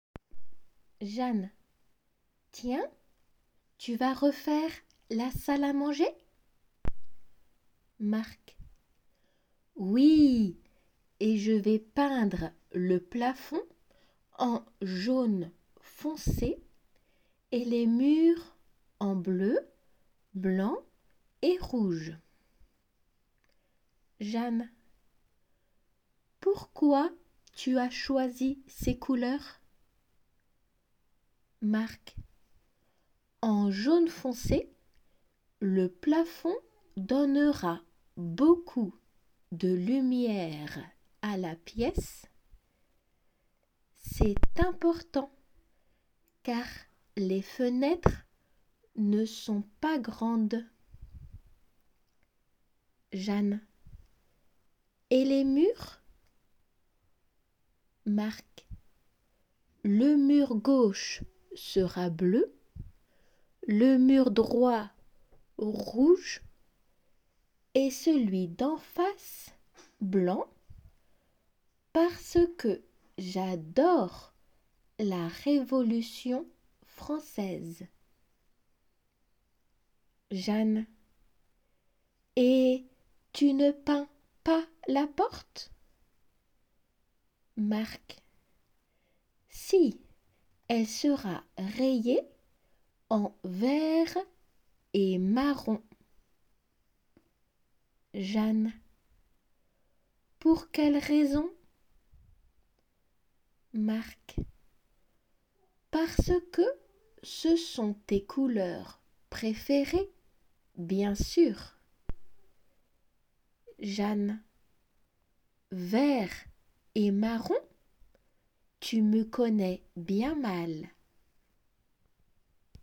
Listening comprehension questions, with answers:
答えを解答用紙の 解答欄にフランス語で書いてください。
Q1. Non, il va refaire la ( ) à ( ) .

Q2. En ( ) ( ).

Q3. Pour donner beaucoup de ( ) à la piéce dont les fenêtres ne sont pas ( ).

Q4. Parce que Marc ( ) la Révolution française.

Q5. Parce qu'il croyait que c'étaient les couleurs ( ) de Jeanne.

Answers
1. salle manger
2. jaune foncé
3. lumière grandes
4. adore
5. préférées

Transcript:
Jeanne : Tiens, tu vas refaire la salle à manger ?
Marc : Oui, je vais peindre le plafond en jaune foncé et les murs en bleu, blanc et rouge.
J : Pourquoi tu as choisi ces couleurs ?
M : En jaune foncé, le plafond donnera beaucoup de lumière à la piéce.
C'est important, car les fenêtres ne sont pas grandes.
J : Et les murs ?
M:Le mur gauche sera bleu, le mur droit, rouge et celui d'en face, blanc, parce que j'adore
la Révolution française.
J : Et tu ne peins pas la porte ?
M : Si, elle sera rayée en vert et marron.
J : Pour quelle raison ?
M : Parce que ce sont tes couleurs préférées, bien sûr !
J : Vert et marron ? Tu me connais bien mal !